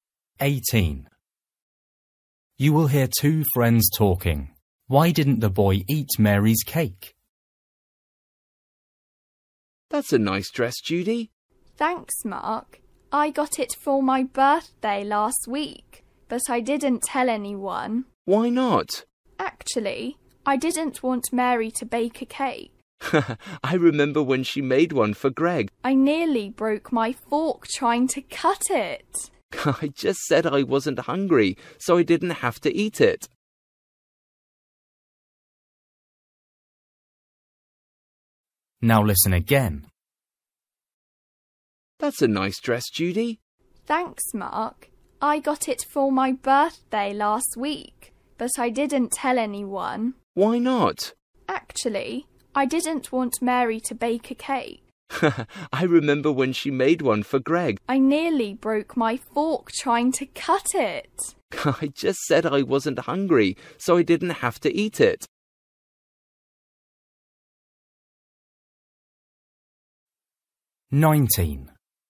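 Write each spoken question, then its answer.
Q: Why didn't the boy eat Mary's cake?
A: Her cakes are too hard to cut; he said he wasn't hungry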